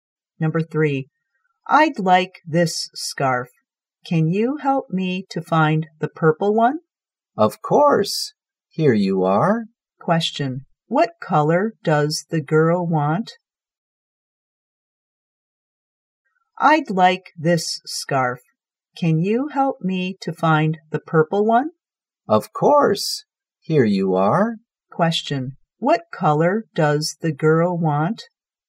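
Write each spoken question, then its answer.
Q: Question, what color does the girl want?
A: Purple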